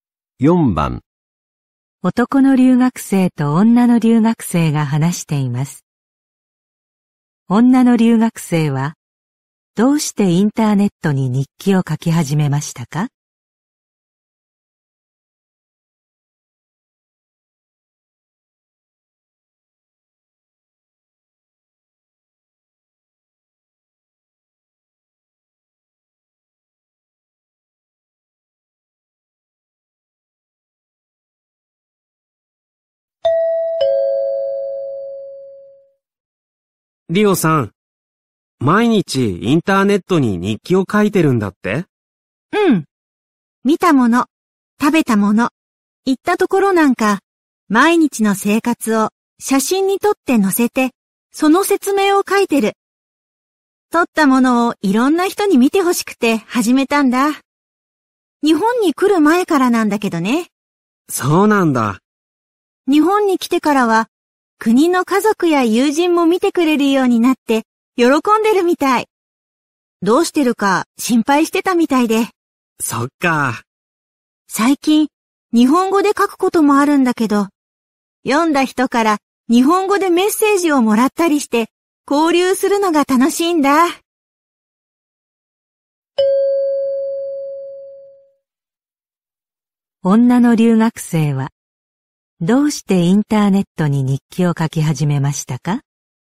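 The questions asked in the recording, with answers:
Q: 女の留学生はどうしてインターネットに日記を書き始めましたか?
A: 撮ったものをいろんな人に見てほしかったから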